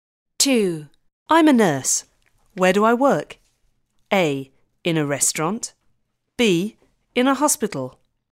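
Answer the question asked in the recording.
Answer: B: In a hospital.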